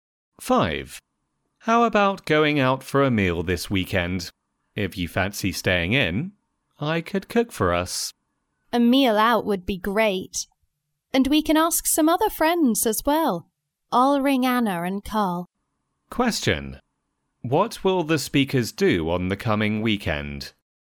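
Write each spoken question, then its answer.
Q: What will the speakers do on the coming weekend?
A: Go out for a meal with friends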